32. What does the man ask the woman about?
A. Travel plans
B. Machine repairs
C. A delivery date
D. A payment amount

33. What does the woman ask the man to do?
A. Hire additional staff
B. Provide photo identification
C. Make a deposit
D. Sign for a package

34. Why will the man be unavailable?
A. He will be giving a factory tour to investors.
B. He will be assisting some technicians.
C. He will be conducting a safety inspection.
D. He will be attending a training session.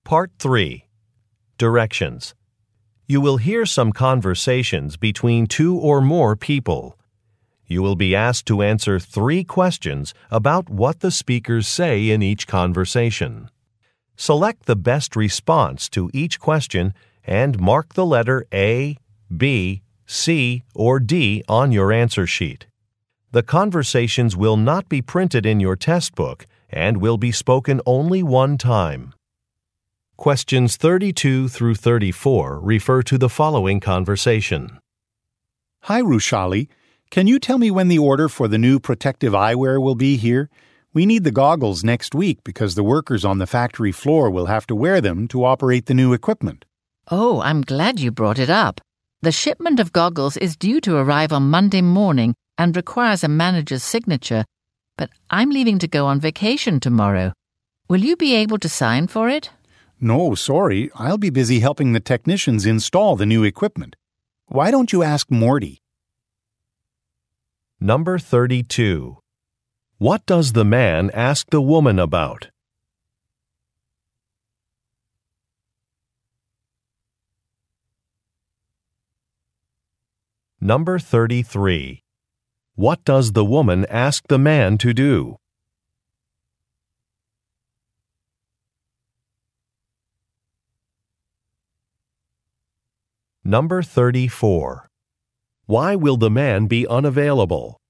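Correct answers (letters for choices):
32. C
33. D
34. B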